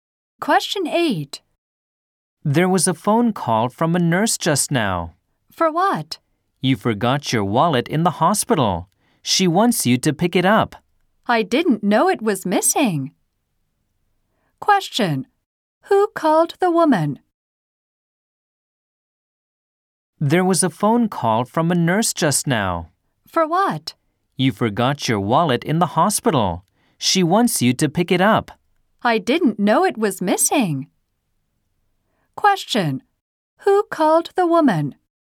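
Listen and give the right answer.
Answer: A nurse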